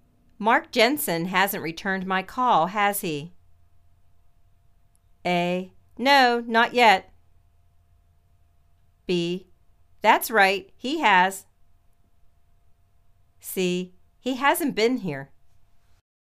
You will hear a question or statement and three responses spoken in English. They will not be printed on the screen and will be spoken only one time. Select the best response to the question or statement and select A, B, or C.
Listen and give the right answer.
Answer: No, not yet.